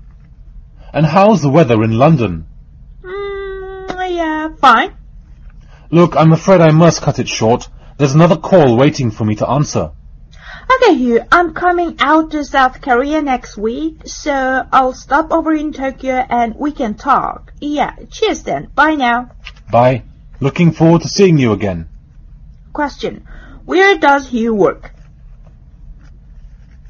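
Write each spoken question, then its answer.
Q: Where does Hugh work?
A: Tokyo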